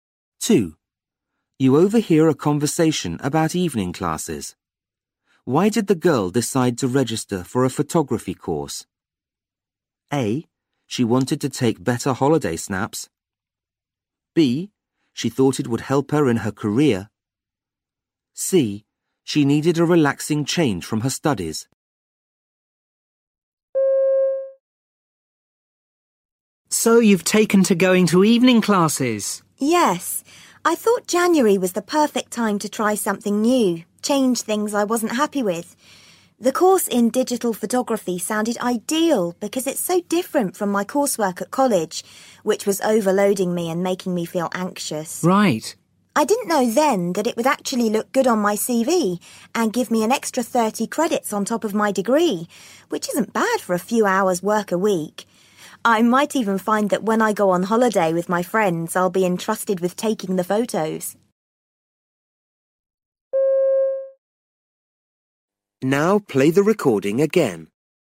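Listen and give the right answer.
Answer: C: She needed a relaxing change from her studies.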